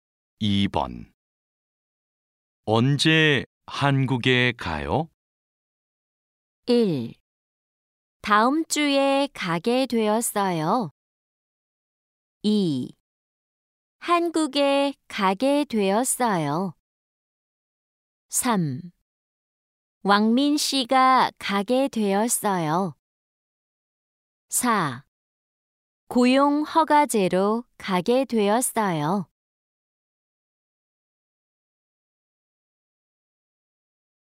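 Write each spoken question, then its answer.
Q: 언제 한국에 가요?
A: 1: 다음 주에 가게 되었어요.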